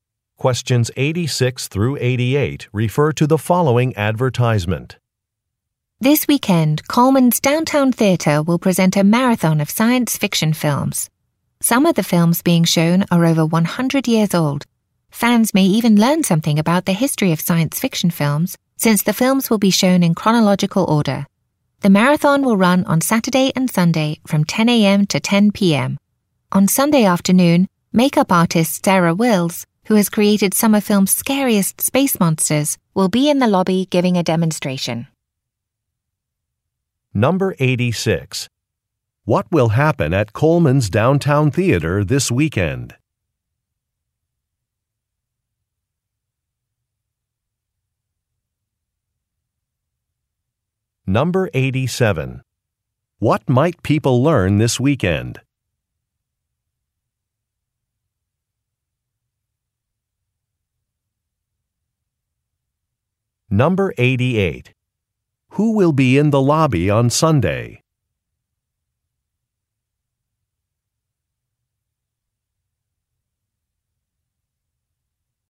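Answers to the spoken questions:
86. A marathon of science fiction films will be shown.
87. Something about the history of science fiction films.
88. Makeup artist Sarah Wills.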